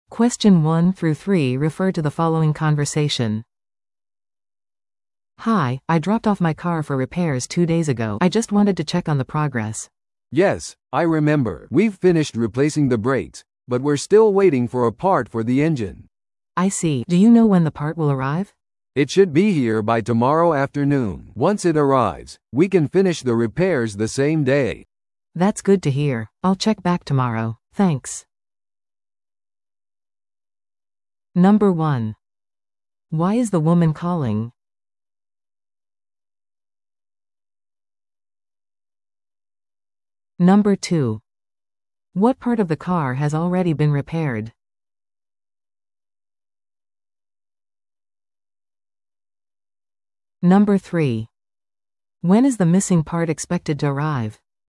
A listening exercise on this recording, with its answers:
Listen to the audio below and answer the questions.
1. Why is the woman calling?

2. What part of the car has already been repaired?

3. When is the missing part expected to arrive?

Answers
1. To check on her car's repair progress
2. The brakes
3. Tomorrow afternoon

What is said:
A: "Hi, I dropped off my car for repairs two days ago. I just wanted to check on the progress."
B: "Yes, I remember. We've finished replacing the brakes, but we're still waiting for a part for the engine."
A: "I see. Do you know when the part will arrive?"
B: "It should be here by tomorrow afternoon. Once it arrives, we can finish the repairs the same day."
A: "That's good to hear. I'll check back tomorrow. Thanks!"